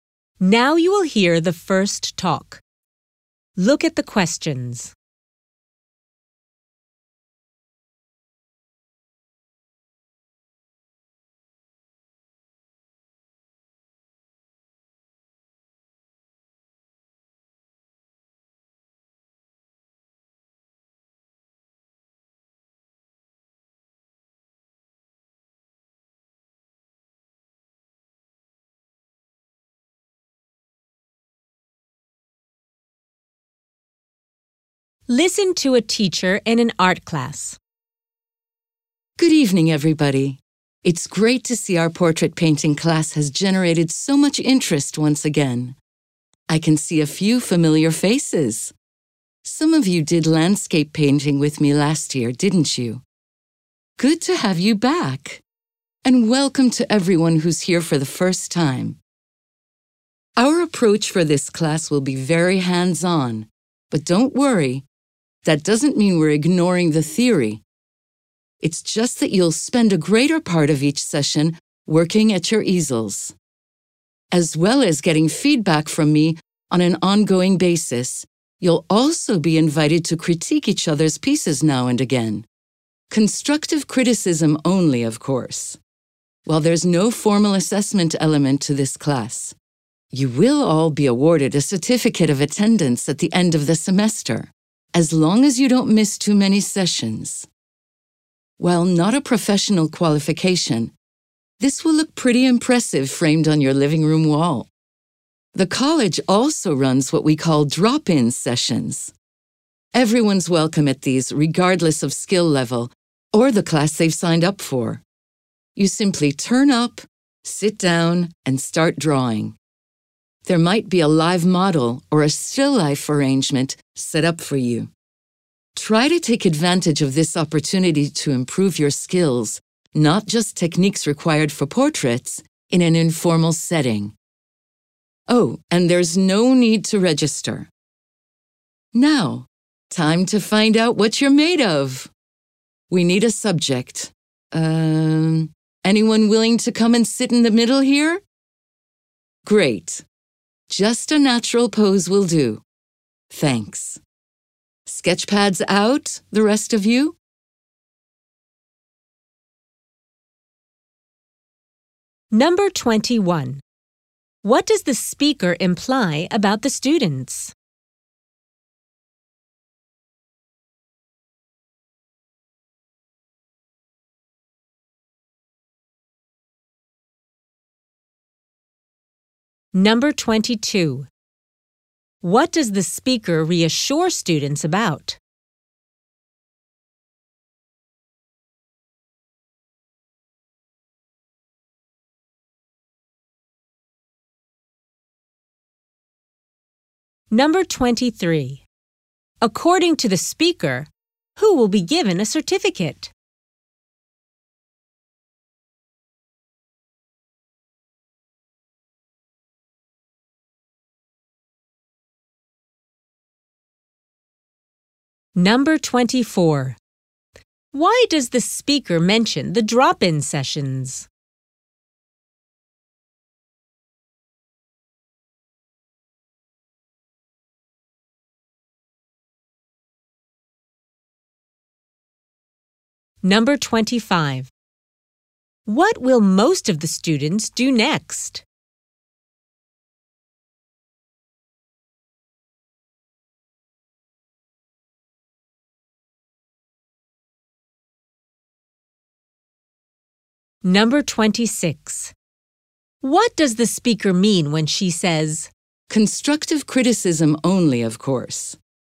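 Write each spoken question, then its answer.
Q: What does the speaker reassure students about?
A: The theory will not be ignored, even though the class is hands-on

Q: According to the speaker, who will be given a certificate?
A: Students who don't miss too many sessions

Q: Why does the speaker mention the drop-in sessions?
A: To encourage students to improve their skills in an informal setting

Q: What will most of the students do next?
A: Sketch a classmate posing as a model

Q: What does the speaker mean when she says,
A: Students should give helpful feedback, not negative comments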